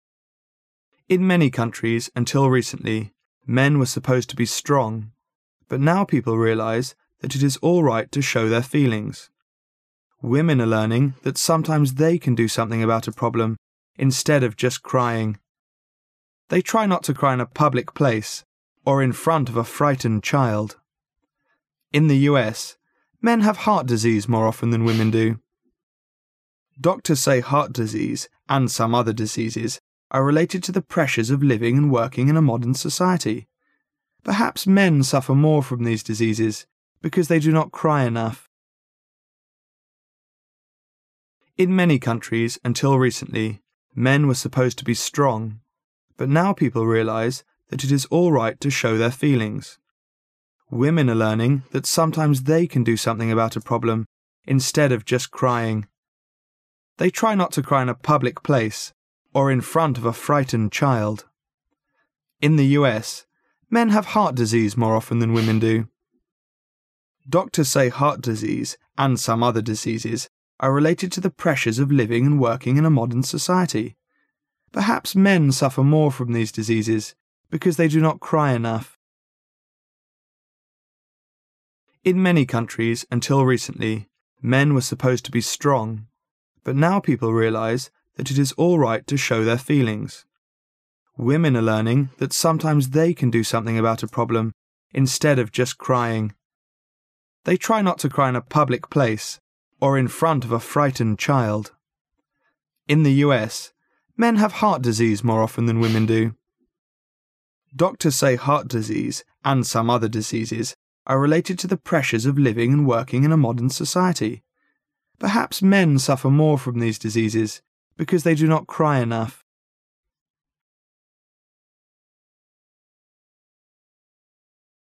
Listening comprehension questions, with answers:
Section C Directions: In this section you will hear a recorded short passage. The passage is printed in the test paper, but with some words or phrases missing. The passage will be read three times. During the second reading ,you are required to put the missing words or phrases on the Answer Sheet in order of the numbered blanks according to what you hear. The third reading is for you to check your writing.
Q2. Women are learning that sometimes they can do something about a problem 2 just crying.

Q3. They try not to cry in a public place or in front of a 3 child.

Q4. Doctors say heart disease and some other diseases are 4 to the pressures of living and working in a modern society.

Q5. Perhaps men 5 more from these diseases because they do not cry enough.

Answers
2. instead of
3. frightened
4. related
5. suffer

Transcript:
[解析] 11-15 In many countries until recently men were supposed to be strong, but now people realize that it is all right to show their feelings. Women are learning that sometimes they can do something about a problem instead of just crying. They try not to cry in a public place or in front of a frightened child. In the U. men have heart disease more often than the women do. Doctors say heart disease and some other diseases are related to the pressures of living and working in a modern society. Perhaps men suffer more from these diseases because they do not cry enough.